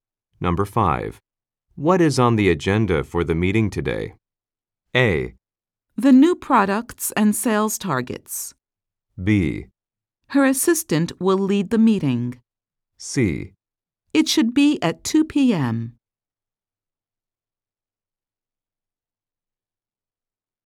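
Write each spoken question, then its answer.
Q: What is on the agenda for the meeting today?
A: A: The new products and sales targets.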